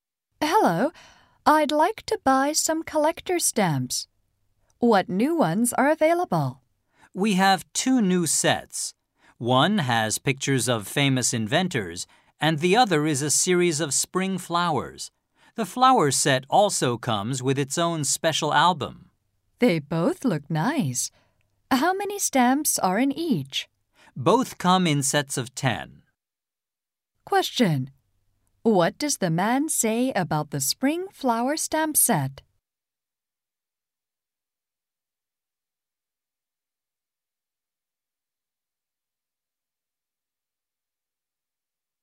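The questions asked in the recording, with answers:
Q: What does the man say about the spring flower stamp set?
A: It comes with its own special album.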